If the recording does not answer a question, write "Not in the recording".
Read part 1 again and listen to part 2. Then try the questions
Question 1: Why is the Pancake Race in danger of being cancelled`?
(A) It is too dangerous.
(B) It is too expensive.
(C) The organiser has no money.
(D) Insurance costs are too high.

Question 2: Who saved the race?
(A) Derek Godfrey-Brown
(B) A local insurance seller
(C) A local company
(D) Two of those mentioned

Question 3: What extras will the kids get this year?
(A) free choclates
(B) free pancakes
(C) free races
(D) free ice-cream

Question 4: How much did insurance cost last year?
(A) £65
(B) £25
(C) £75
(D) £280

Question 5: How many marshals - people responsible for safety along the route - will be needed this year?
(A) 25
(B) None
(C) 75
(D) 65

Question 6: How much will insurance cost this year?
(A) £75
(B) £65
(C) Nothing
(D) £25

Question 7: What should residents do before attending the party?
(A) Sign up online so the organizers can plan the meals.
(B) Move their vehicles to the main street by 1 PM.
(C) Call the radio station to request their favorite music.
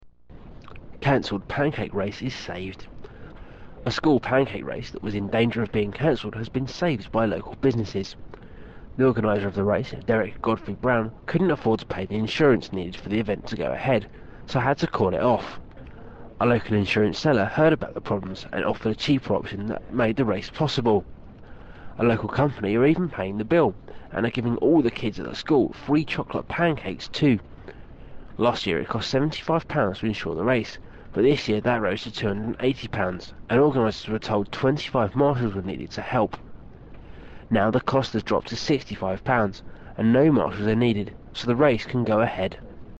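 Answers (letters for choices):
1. D
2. D
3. B
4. C
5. B
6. B
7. Not in the recording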